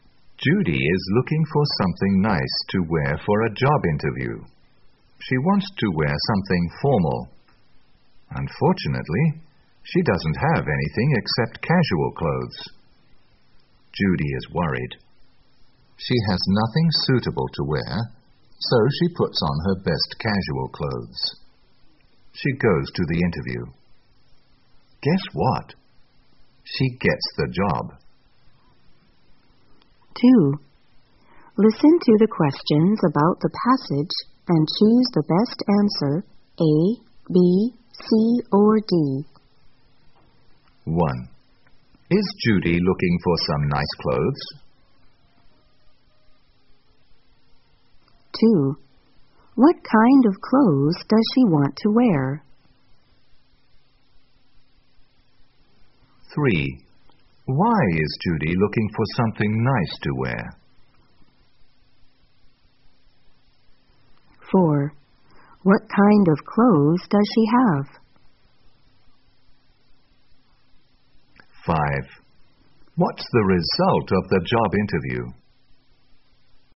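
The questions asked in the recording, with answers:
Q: Is Judy looking for some nice clothes?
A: Yes, she is.

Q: What kind of clothes does she want to wear?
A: Something formal

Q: Why is Judy looking for something nice to wear?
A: For a job interview

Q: What kind of clothes does she have?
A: Only casual clothes

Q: What's the result of the job interview?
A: She gets the job.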